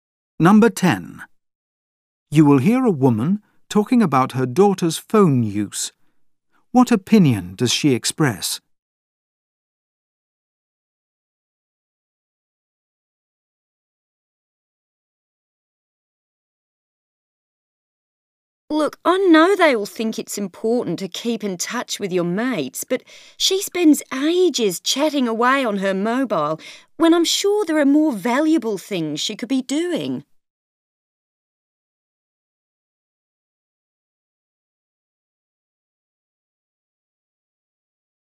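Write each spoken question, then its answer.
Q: What opinion does she express?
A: Her daughter wastes too much time on her phone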